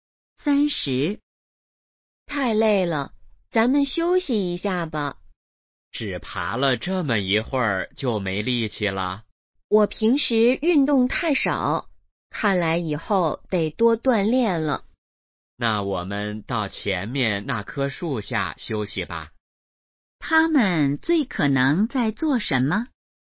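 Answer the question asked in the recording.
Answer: 爬山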